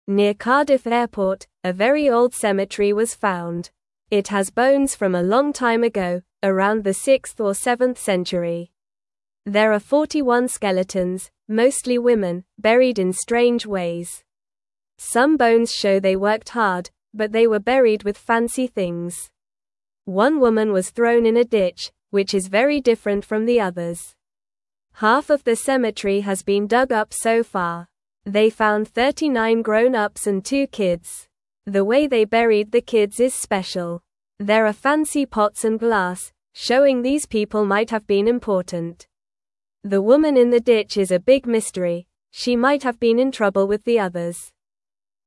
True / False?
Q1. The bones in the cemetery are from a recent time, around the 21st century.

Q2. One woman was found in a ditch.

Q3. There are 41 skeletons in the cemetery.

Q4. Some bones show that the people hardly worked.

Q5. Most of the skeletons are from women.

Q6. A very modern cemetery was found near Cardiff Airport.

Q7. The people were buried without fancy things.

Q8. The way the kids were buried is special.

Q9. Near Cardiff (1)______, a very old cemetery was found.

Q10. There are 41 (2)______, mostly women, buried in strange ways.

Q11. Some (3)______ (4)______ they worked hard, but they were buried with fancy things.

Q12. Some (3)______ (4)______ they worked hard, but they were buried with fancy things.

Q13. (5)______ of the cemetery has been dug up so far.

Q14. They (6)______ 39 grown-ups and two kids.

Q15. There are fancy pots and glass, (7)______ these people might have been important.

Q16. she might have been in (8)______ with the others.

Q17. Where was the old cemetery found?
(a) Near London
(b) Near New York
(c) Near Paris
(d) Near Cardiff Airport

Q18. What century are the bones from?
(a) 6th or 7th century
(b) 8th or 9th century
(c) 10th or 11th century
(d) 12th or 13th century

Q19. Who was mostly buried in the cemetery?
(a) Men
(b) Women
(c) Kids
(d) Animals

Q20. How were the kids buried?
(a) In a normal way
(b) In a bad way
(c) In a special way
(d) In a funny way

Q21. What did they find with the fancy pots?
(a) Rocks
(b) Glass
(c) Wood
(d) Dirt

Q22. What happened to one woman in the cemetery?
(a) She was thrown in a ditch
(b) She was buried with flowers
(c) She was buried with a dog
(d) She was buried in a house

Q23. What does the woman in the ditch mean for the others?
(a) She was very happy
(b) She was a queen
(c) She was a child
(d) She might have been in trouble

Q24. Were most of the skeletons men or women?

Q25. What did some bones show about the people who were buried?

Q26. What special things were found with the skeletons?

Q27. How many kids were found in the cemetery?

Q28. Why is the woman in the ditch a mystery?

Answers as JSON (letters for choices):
{"1": "False", "2": "True", "3": "True", "4": "False", "5": "True", "6": "False", "7": "False", "8": "True", "9": "Airport", "10": "skeletons", "11": "bones", "12": "show", "13": "Half", "14": "found", "15": "showing", "16": "trouble", "17": "d", "18": "a", "19": "b", "20": "c", "21": "b", "22": "a", "23": "d", "24": "Most of the skeletons were women.", "25": "Some bones showed they worked hard.", "26": "Fancy pots and glass were found with the skeletons.", "27": "Two kids were found.", "28": "She is a mystery because she was buried differently from the others."}

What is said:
Near Cardiff Airport, a very old cemetery was found. It has bones from a long time ago, around the 6th or 7th century. There are 41 skeletons, mostly women, buried in strange ways. Some bones show they worked hard, but they were buried with fancy things. One woman was thrown in a ditch, which is very different from the others.
Half of the cemetery has been dug up so far. They found 39 grown-ups and two kids. The way they buried the kids is special. There are fancy pots and glass, showing these people might have been important. The woman in the ditch is a big mystery; she might have been in trouble with the others.

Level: Level 1